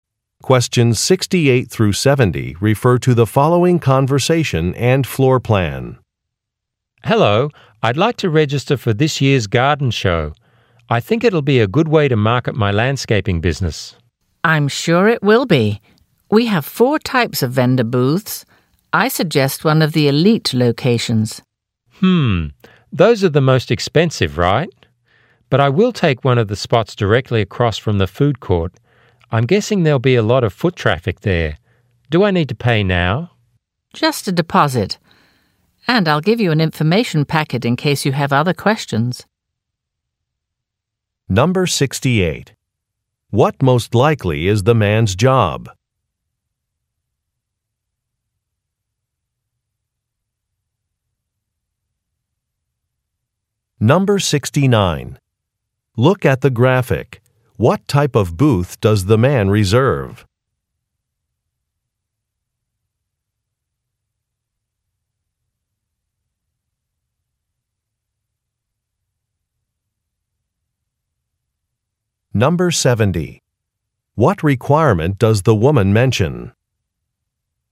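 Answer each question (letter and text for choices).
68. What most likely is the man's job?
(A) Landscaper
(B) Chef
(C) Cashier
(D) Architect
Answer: (A) Landscaper

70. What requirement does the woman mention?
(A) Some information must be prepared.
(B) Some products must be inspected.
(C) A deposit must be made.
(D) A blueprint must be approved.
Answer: (C) A deposit must be made.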